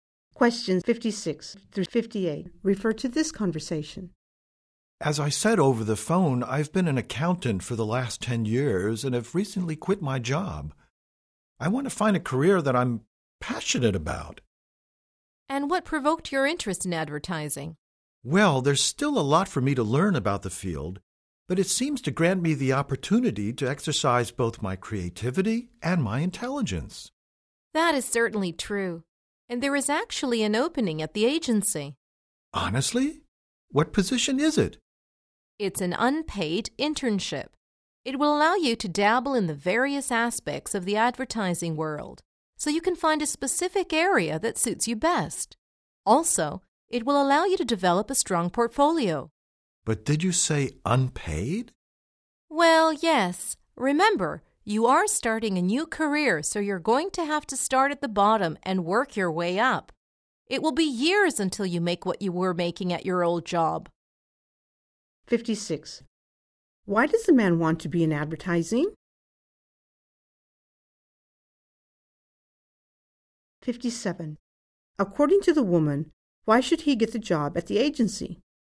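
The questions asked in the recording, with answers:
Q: Why does the man want to be in advertising?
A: To use both his creativity and intelligence

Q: According to the woman, why should he get the job at the agency?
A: To try various areas of advertising and build a portfolio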